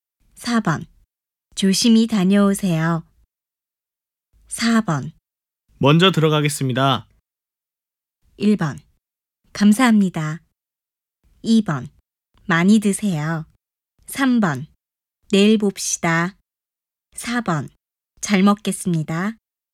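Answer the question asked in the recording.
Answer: 3: 내일 봅시다.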